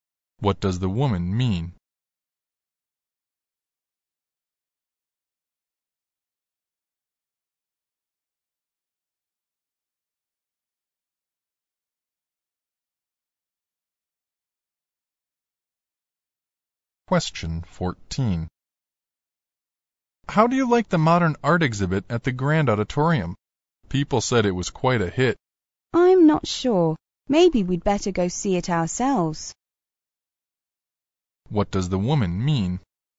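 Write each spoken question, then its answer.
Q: What does the woman mean?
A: They should go see the exhibit and judge it themselves.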